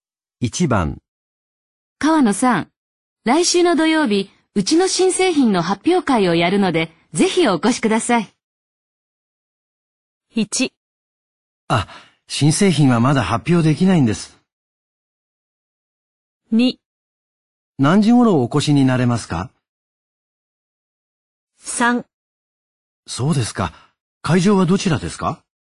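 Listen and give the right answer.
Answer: 3: そうですか。会場はどちらですか?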